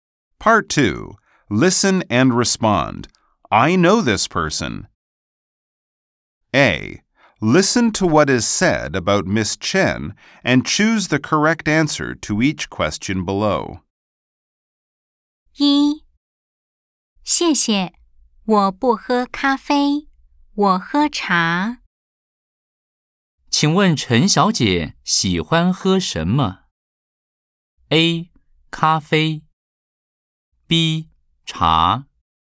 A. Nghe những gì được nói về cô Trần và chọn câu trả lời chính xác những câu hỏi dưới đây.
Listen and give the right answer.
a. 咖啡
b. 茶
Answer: b. 茶

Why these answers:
謝謝,我不喝咖啡。我喝茶。